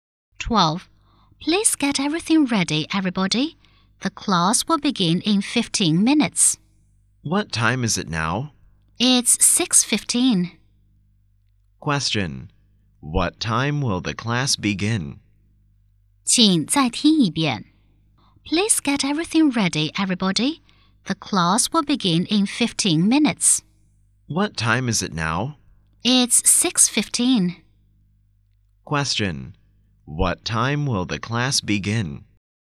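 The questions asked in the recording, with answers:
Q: What time will the class begin?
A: At 6:30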